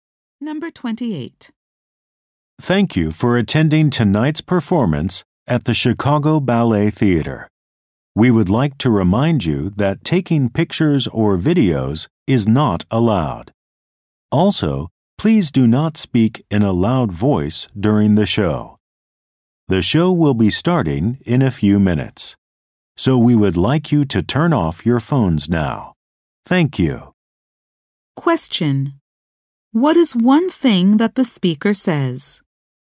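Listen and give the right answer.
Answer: Taking pictures or videos is not allowed.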